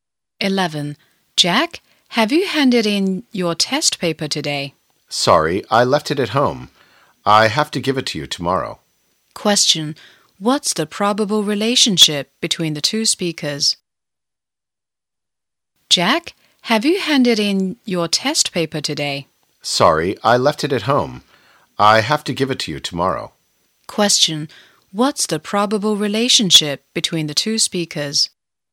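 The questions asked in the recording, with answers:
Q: What's the probable relationship between the two speakers?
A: Teacher and student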